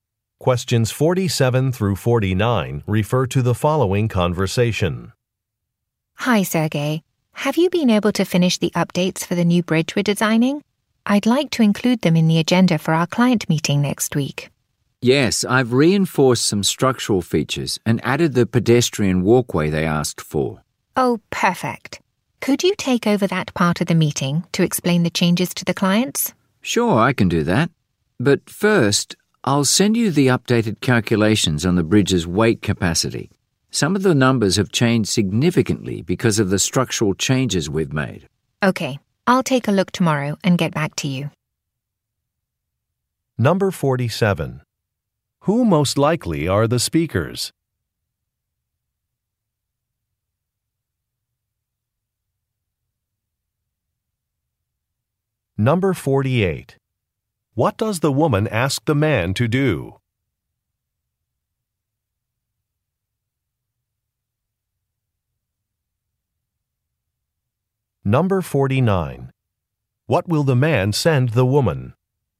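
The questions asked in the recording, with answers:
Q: Who most likely are the speakers?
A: Engineers designing a bridge

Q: What does the woman ask the man to do?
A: Explain the changes to the clients at the meeting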